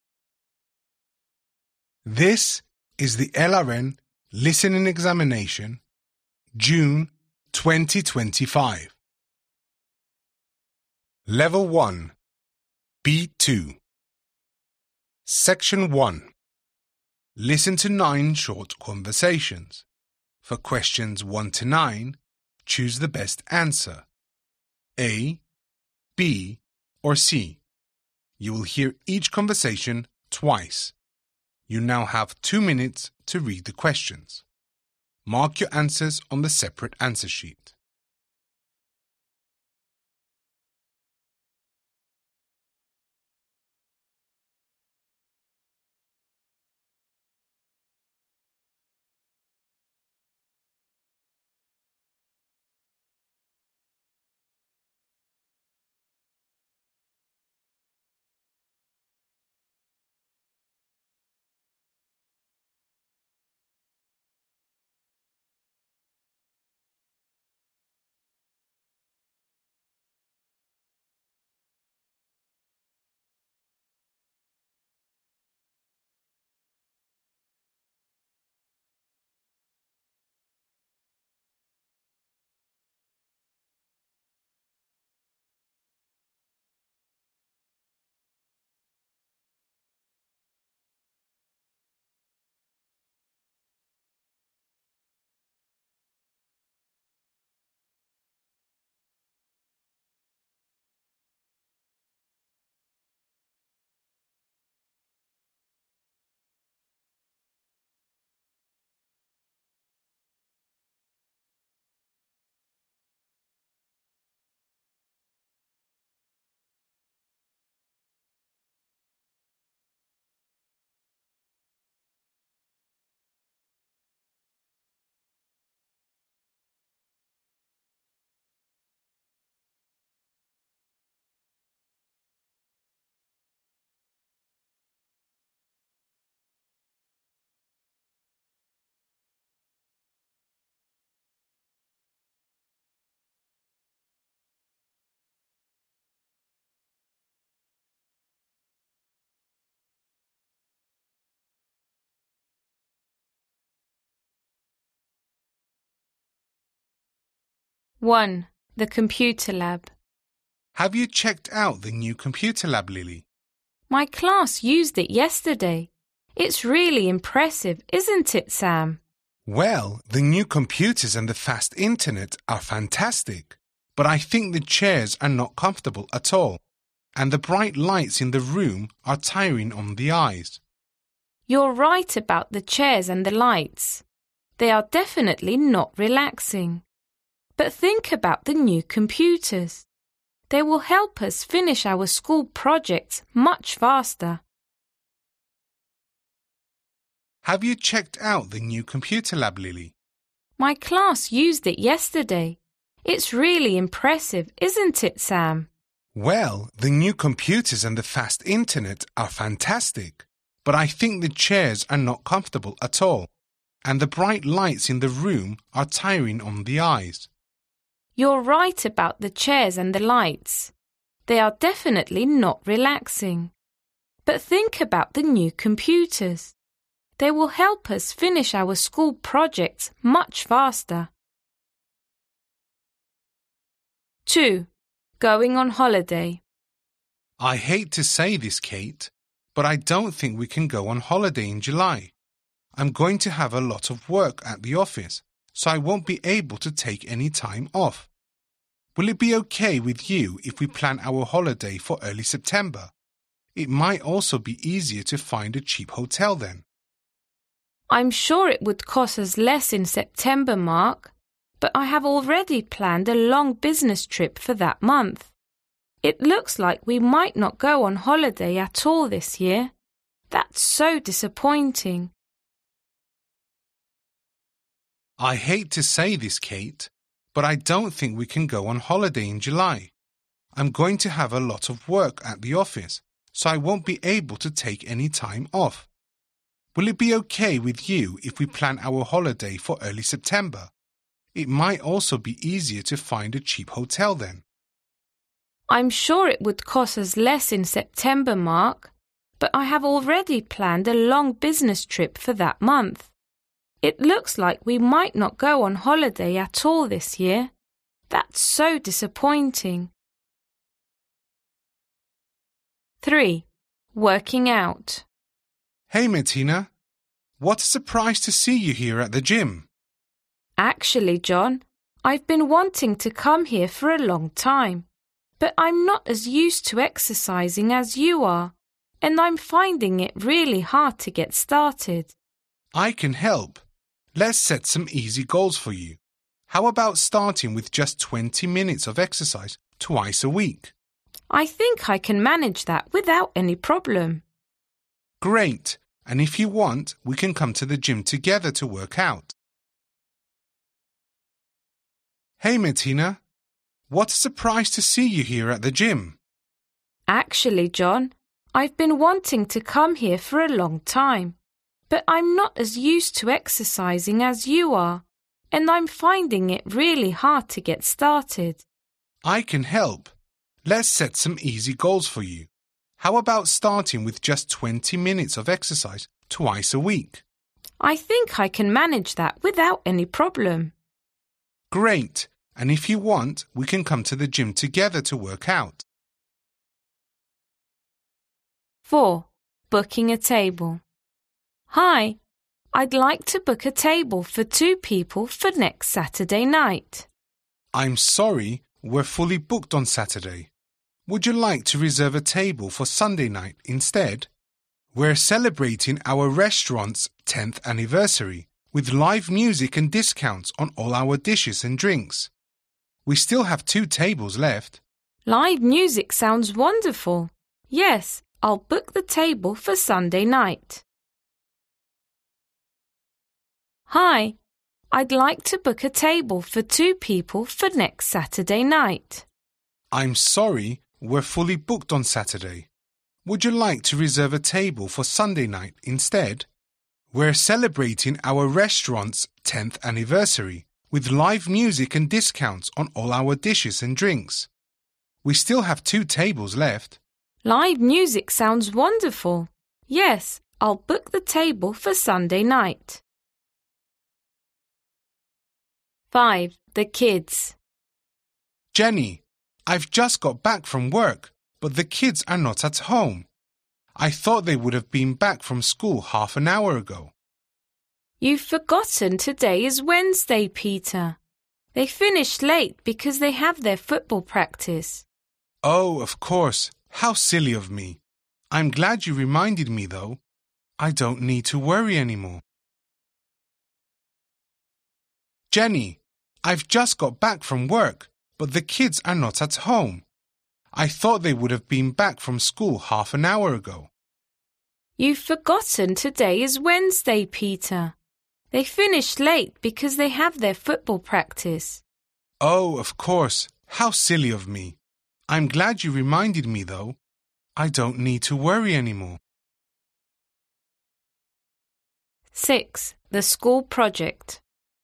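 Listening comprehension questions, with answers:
Listen to 9 short conversations. For questions 1-9, choose the best answer (A, B or C).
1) What do both Sam and Lily agree on about the computer lab?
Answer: The chairs are uncomfortable and the lights are tiring on the eyes

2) From what you hear, you understand that Mark and Kate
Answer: might not go on holiday at all this year

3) What is TRUE according to what you hear?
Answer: John offers to help Martina start exercising with easy goals

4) What makes the woman reserve a table at the restaurant for Sunday night?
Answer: The live music

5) How does Jennie make Peter feel?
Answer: Relieved

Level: LRN B2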